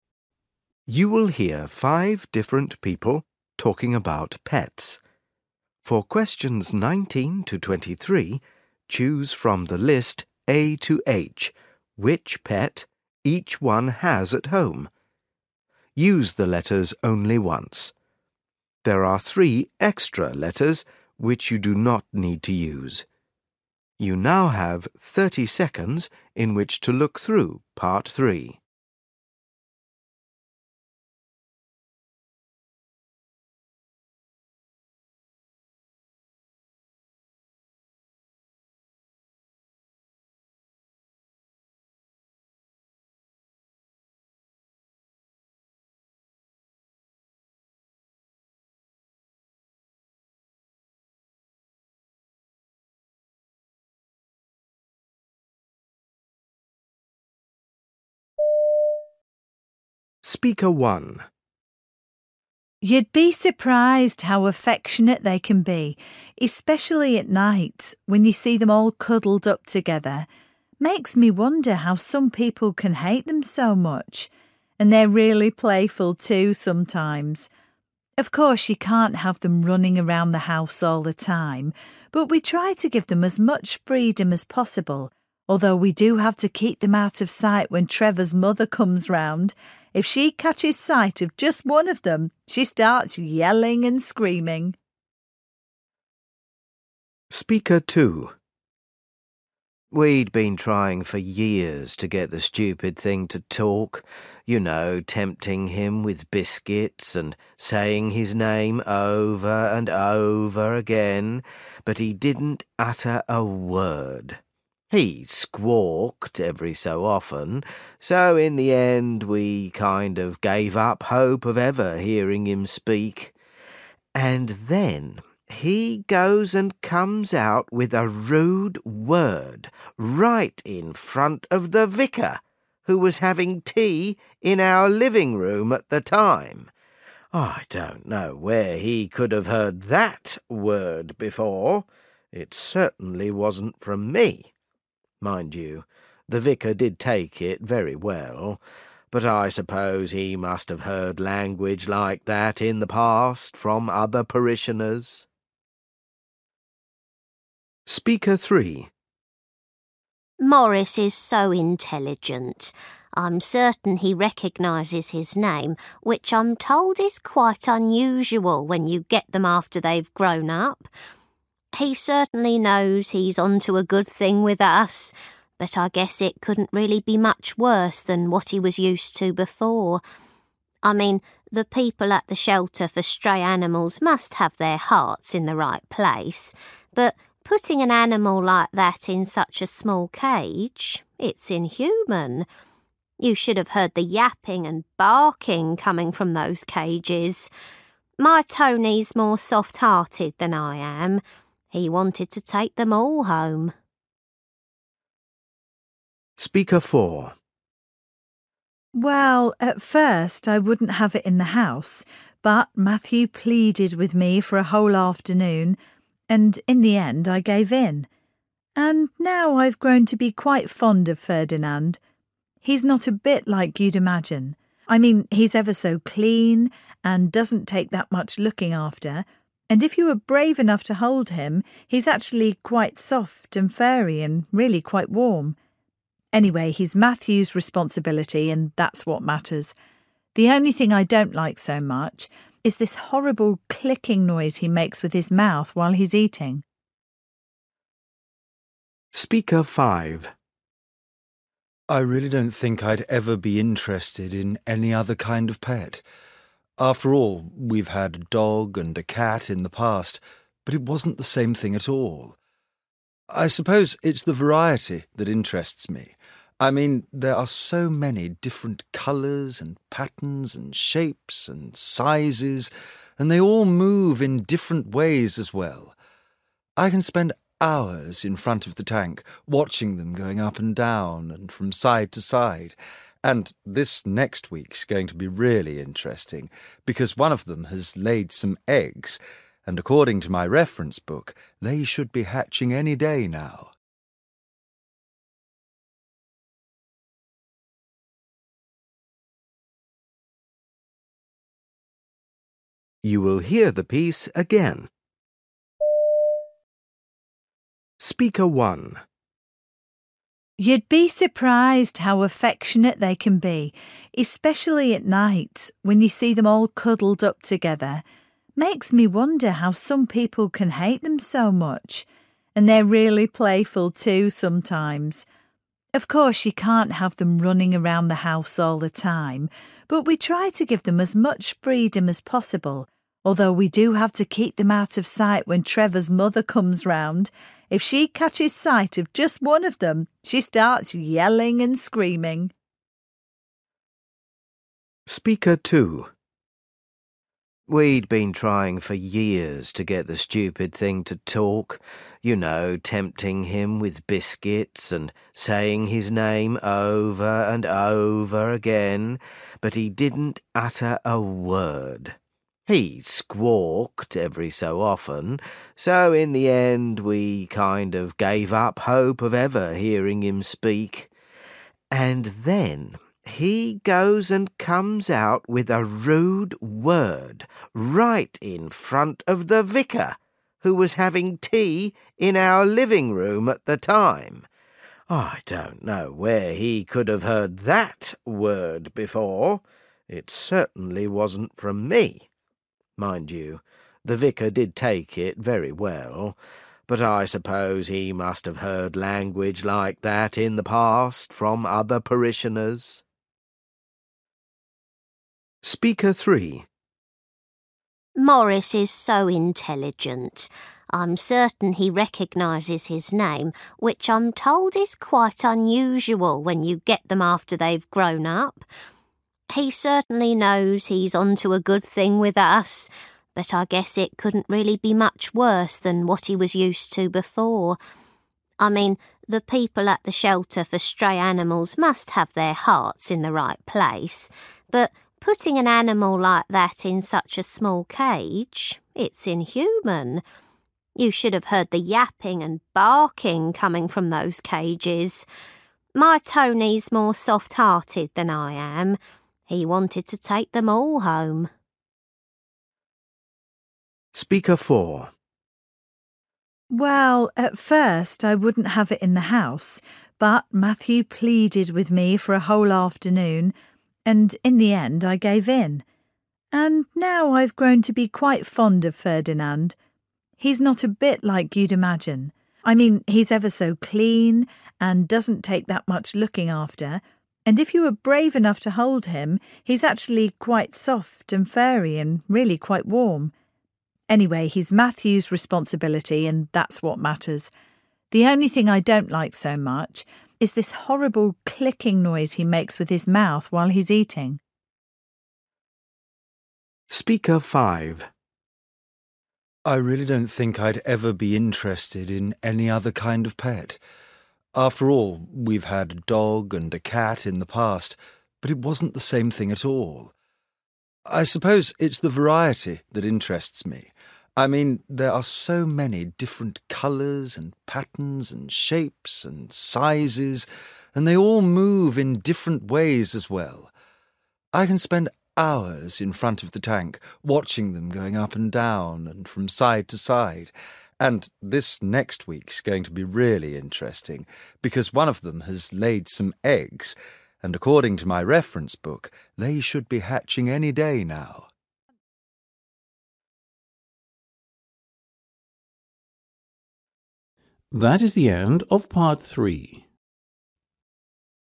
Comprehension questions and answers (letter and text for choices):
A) cat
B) dog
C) parrot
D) fish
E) tortoise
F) spider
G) canary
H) mice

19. Speaker 1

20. Speaker 2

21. Speaker 3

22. Speaker 4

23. Speaker 5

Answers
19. H) mice
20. C) parrot
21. B) dog
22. F) spider
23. D) fish

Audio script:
You will hear five different people talking about pets. For questions 19-23, choose from the list A-H which pet each one has at home. Use the letters only once. There are three extra letters which you do not need to use.
A cat
19 Speaker 1
20 Speaker 2
21 Speaker 3
22 Speaker 4
23 Speaker 5
You'd be surprised how affectionate they can be, especially at night when you see them all cuddled up together. Makes me wonder how some people can hate them so much. And they're really playful too sometimes. Of course, you can't have them running around the house all the time but we try to give them as much freedom as possible although we do have to keep them out of sight when Trevor's mother comes round. If she catches sight of just one of them, she starts yelling and screaming.
We'd been trying for years to get the stupid thing to talk. You know, tempting him with biscuits and saying his name over and over again. But he didn't utter a word. He squawked every so often so in the end we kind of gave up hope of ever hearing him speak. And then he goes and comes out with a rude word right in front of the vicar, who was having tea in our living room at the time. I don't know where he could have heard that word before. It certainly wasn't from me. Mind you, the vicar did take it very well, but I suppose he must have heard language like that in the past from other parishioners.
Maurice is so intelligent. I'm certain he recognises his name, which I'm told is quite unusual when you get them after they've grown up. He certainly knows he's onto a good thing with us, but I guess it couldn't really be much worse than what he was used to before. I mean, the people at the shelter for stray animals must have their hearts in the right place, but putting an animal like that in such a small cage – it's inhuman. You should have heard the yapping and barking coming from those cages. My Tony's more soft-hearted than I am. He wanted to take them all home.
Well, at first, I wouldn't have it in the house but Matthew pleaded with me for a whole afternoon and in the end I gave in. And now I've grown to be quite fond of Ferdinand. He's not a bit like you'd imagine. I mean he's ever so clean and doesn't take that much looking after and if you are brave enough to hold him, he's actually quite soft and furry and really quite warm. Anyway, he's Matthew's responsibility and that's what matters. The only thing I don't like so much is this horrible clicking noise he makes with his mouth while he's eating.
I really don't think I'd ever be interested in any other kind of pet. After all, we've had a dog and a cat in the past but it wasn't the same thing at all. I suppose it's the variety that interests me. I mean there are so many different colours and patterns and shapes and sizes and they all move in different ways as well. I can spend hours in front of the tank watching them going up and down and from side to side and this next week's going to be really interesting because one of them has laid some eggs and according to my reference book, they should be hatching any day now.